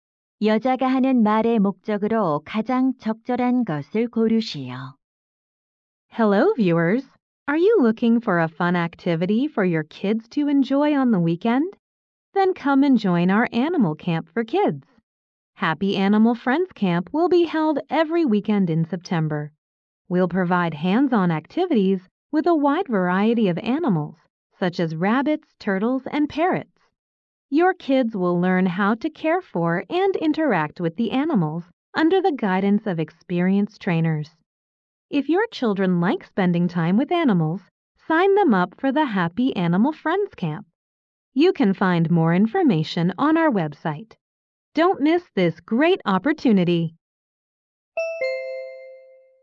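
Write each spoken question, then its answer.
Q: 다음을 듣고 여자가 하는 말의 목적으로 가장 적절한 것을 고르시오.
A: 어린이 동물 캠프 참가를 홍보하려고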